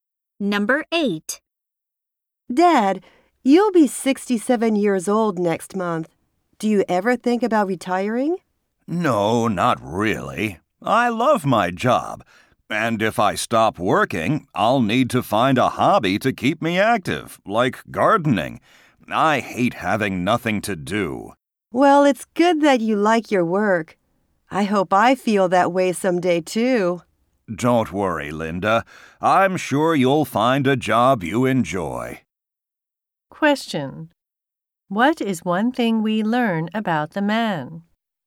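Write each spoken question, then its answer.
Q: What is one thing we learn about the man?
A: He loves his job and doesn't want to retire.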